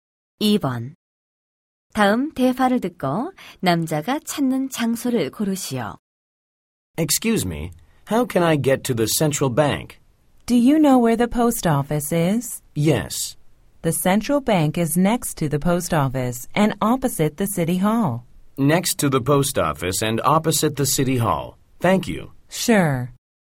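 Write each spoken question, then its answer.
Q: 다음 대화를 듣고 남자가 찾는 장소를 고르시오.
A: central bank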